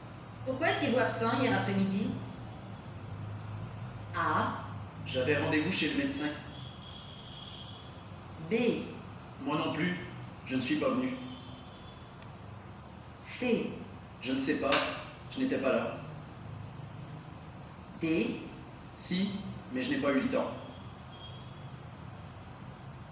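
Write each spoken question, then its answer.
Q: Pourquoi êtes-vous absent hier après-midi?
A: A: J'avais rendez-vous chez le médecin.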